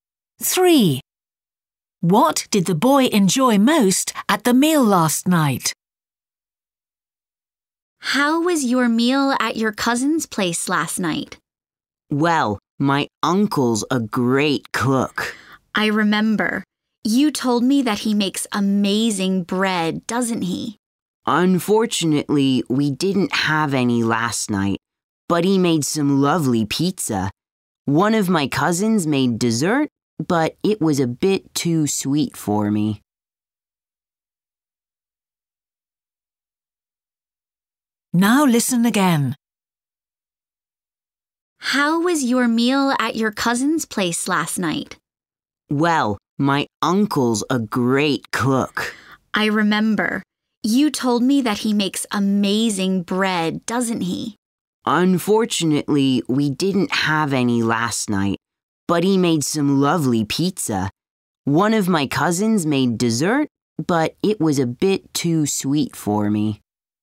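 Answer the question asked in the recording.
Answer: The pizza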